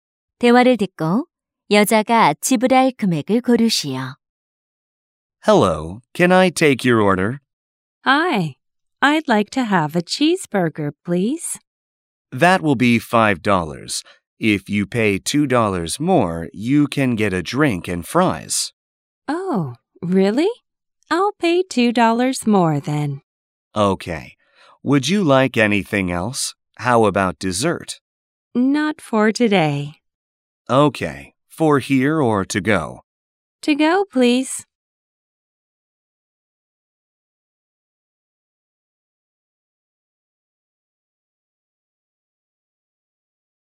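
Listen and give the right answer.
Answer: 7달러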